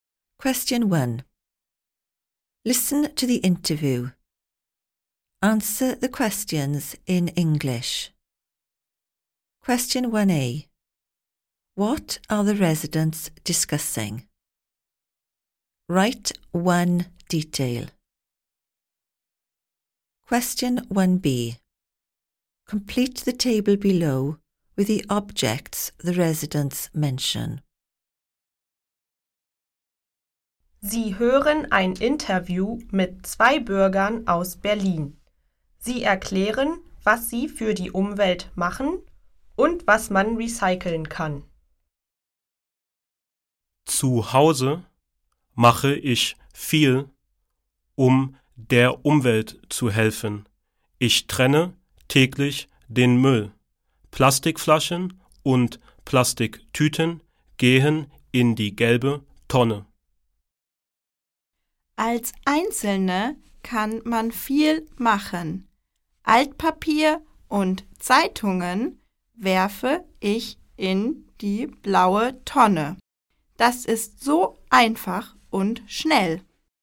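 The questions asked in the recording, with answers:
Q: What are the residents discussing?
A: What they do for the environment / recycling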